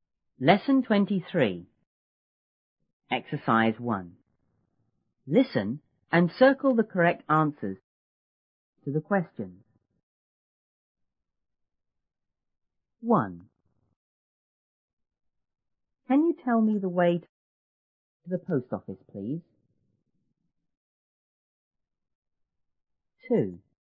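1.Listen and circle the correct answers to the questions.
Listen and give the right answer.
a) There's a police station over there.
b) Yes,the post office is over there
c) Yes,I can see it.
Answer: b) Yes,the post office is over there

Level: 初中英语广州版1B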